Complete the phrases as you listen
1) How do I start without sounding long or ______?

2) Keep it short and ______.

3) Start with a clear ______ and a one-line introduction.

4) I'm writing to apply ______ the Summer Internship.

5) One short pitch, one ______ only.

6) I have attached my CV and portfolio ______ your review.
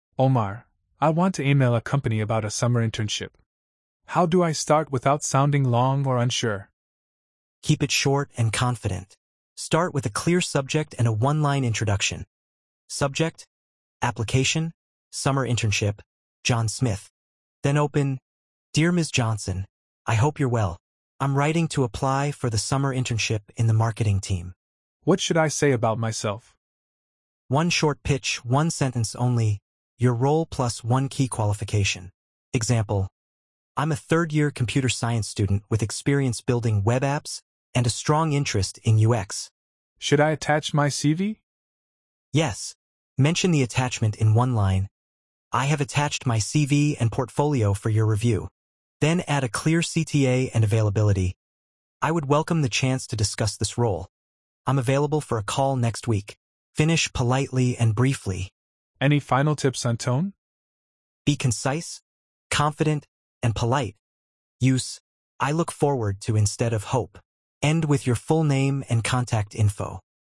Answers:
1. unsure
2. confident
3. subject
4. for
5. sentence
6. for

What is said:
Ahmed: Omar, I want to email a company about a summer internship. How do I start without sounding long or unsure?
Omar: Keep it short and confident. Start with a clear subject and a one-line introduction:
Subject: Application: Summer Internship (John Smith)."
Then open:
Dear Ms. Johnson, I hope you're well. I'm writing to apply for the Summer Internship in the Marketing team.
Ahmed: What should I say about myself?
Omar: One short pitch, one sentence only: your role + one key qualification. Example: "I'm a third-year Computer Science student with experience building web apps and a strong interest in UX."
Ahmed: Should I attach my CV?
Omar: Yes, mention the attachment in one line: "I have attached my CV and portfolio for your review." Then add a clear CTA and availability: "I would welcome the chance to discuss this role; I'm available for a call next week." Finish politely and briefly.
Ahmed: Any final tips on tone?
Omar: Be concise, confident, and polite, use "I look forward to" instead of "hope." End with your full name and contact info.